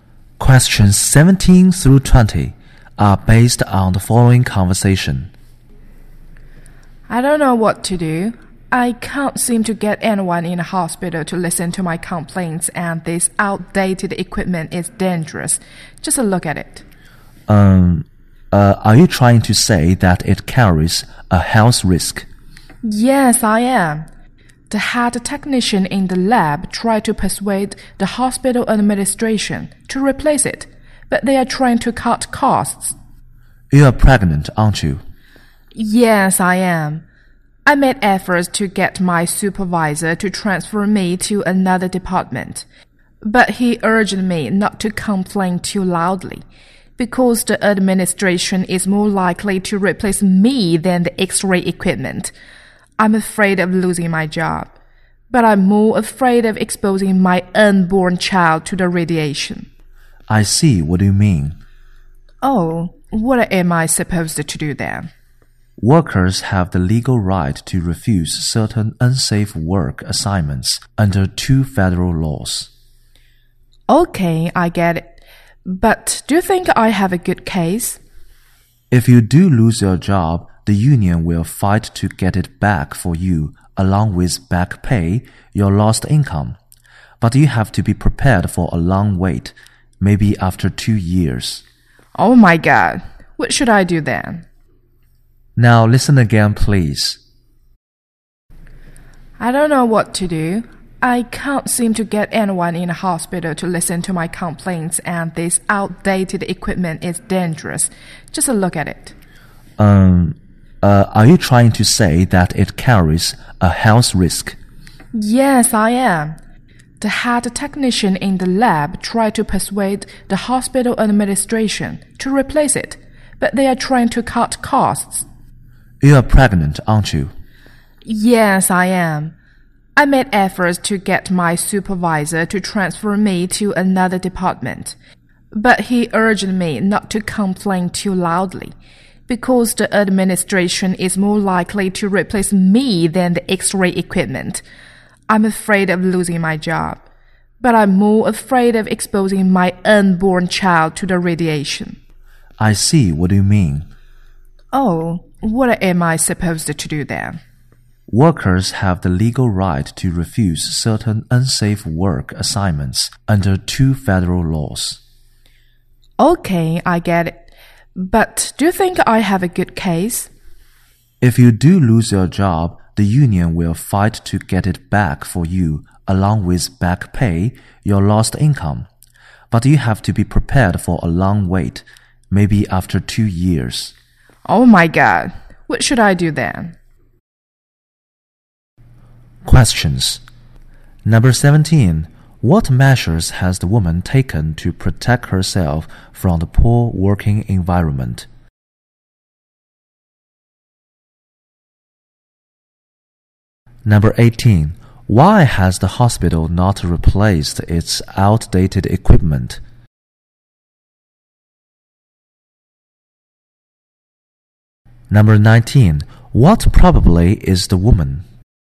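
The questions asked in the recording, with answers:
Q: What measures has the woman taken to protect herself from the poor working environment?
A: She tried to get her supervisor to transfer her to another department

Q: Why has the hospital not replaced its outdated equipment?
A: The hospital is trying to cut costs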